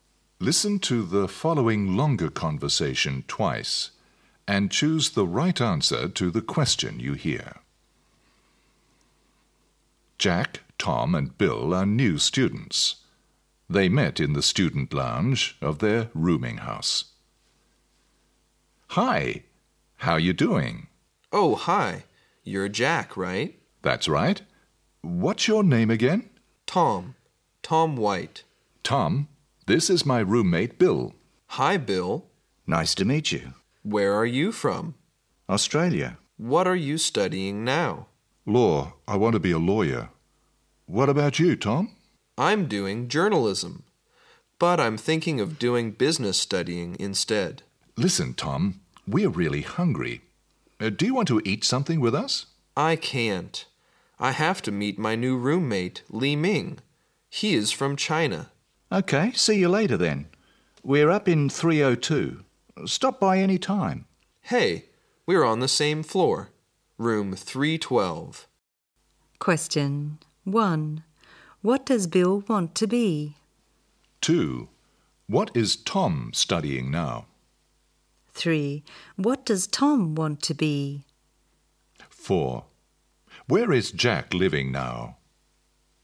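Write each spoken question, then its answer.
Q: What does Bill want to be?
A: A lawyer

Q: What is Tom studying now?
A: Journalism

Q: Where is Jack living now?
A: Room 302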